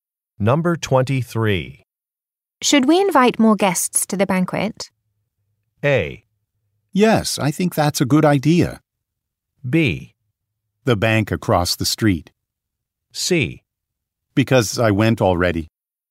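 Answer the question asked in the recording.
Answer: A: Yes, I think that's a good idea.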